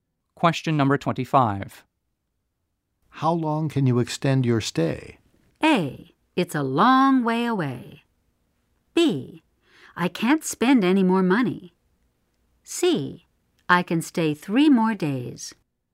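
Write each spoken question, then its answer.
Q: How long can you extend your stay?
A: C: I can stay 3 more days.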